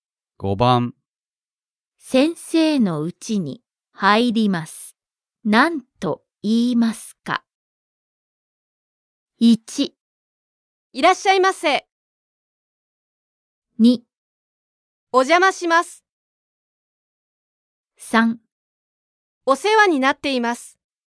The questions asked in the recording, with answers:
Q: 先生のうちに入ります。なんと言いますか?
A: Choice 2. お邪魔します。